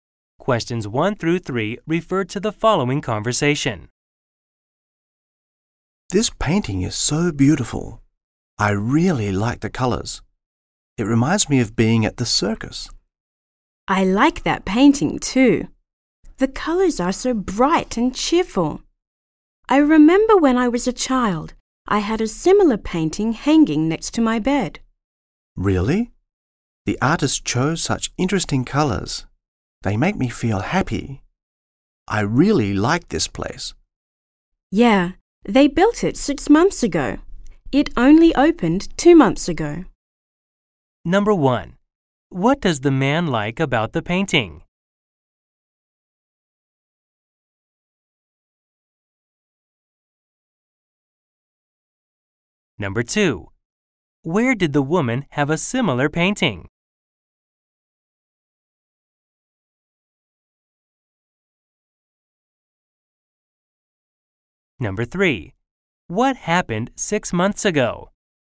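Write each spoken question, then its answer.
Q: What does the man like about the painting?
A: The colors

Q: Where did the woman have a similar painting?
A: Next to her bed when she was a child

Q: What happened 6 months ago?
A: This place was built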